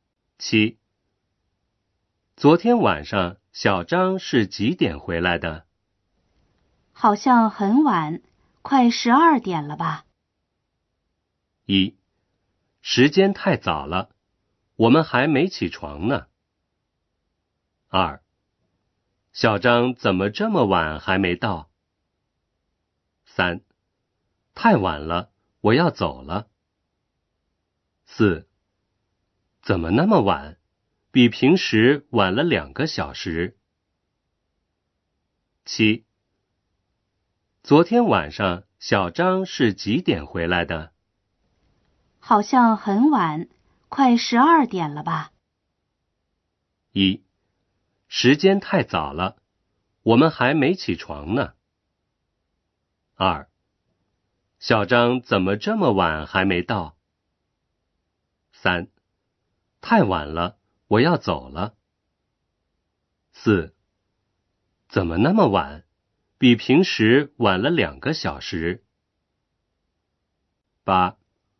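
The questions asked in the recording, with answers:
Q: 昨天晚上小张是几点回来的?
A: 四: 怎么那么晚?比平时晚了两个小时。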